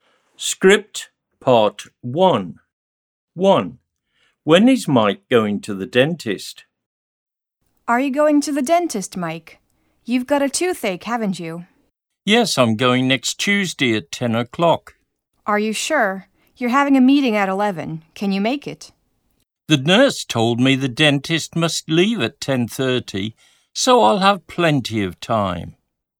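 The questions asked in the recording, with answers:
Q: When is Mike going to the dentist?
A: Next Tuesday at 10 o'clock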